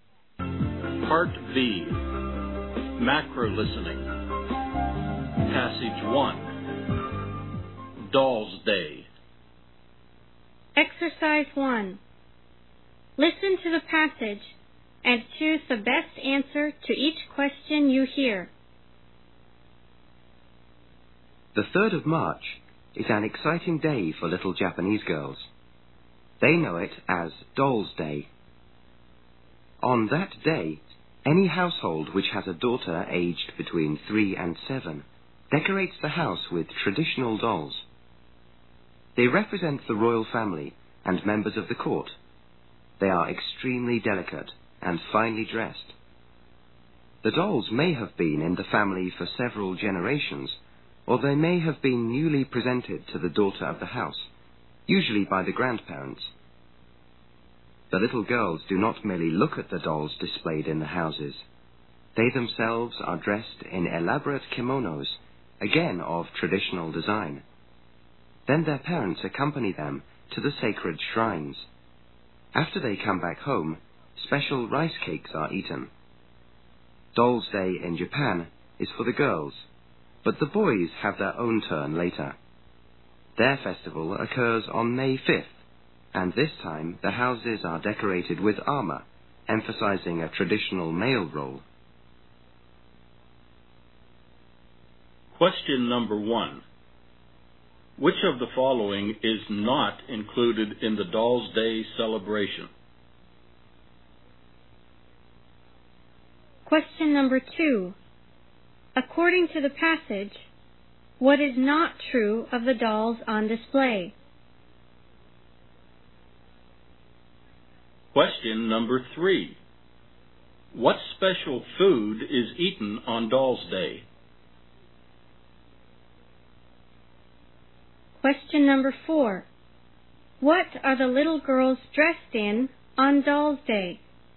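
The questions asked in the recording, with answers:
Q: What special food is eaten on Dolls Day?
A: Special rice cakes

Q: What are the little girls dressed in on Dolls Day?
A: Elaborate traditional kimonos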